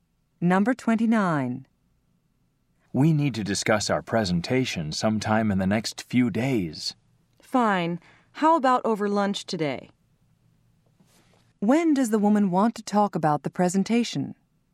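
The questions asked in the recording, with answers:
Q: When does the woman want to talk about the presentation?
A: Over lunch today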